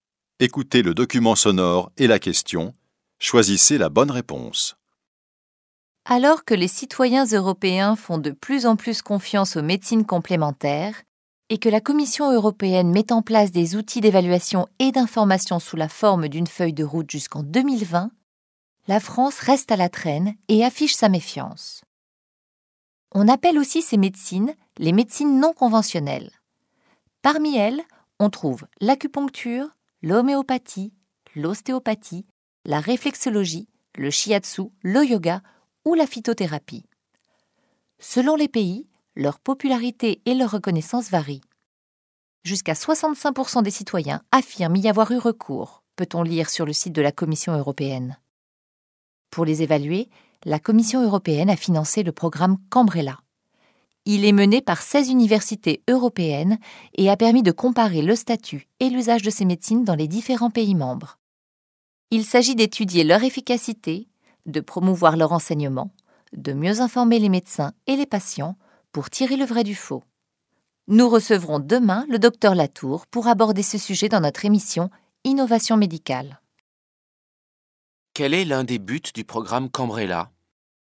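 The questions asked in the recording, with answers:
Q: Quel est l'un des buts du programme Cambrella ?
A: Étudier l'efficacité des médecines complémentaires (et mieux informer médecins et patients)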